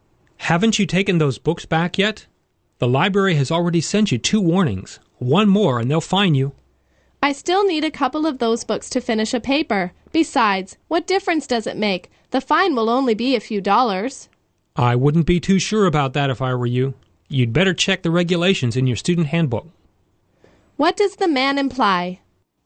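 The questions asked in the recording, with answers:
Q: What does the man imply?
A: The fine may be much more than a few dollars.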